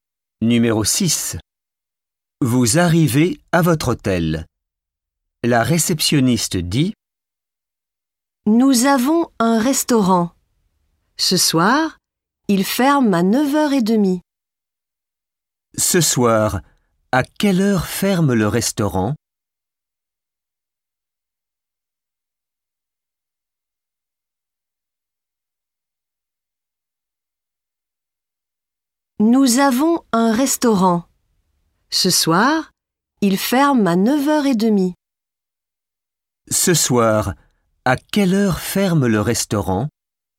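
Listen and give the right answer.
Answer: À 9h30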